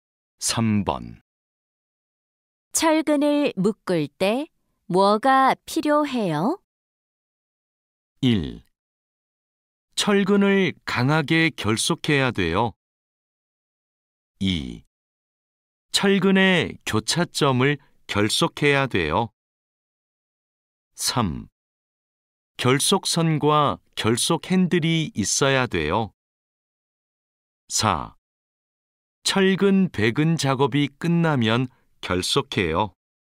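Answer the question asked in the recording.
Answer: 3: 결속선과 결속 핸들이 있어야 돼요.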